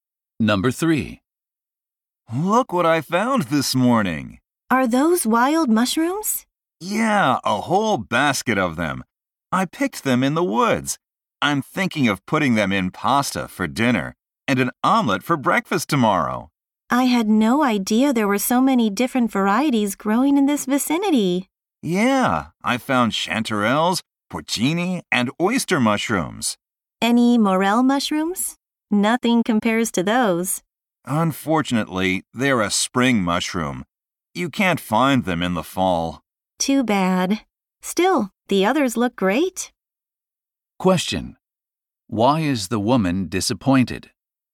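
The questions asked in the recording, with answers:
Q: Why is the woman disappointed?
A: Morel mushrooms can't be found in the fall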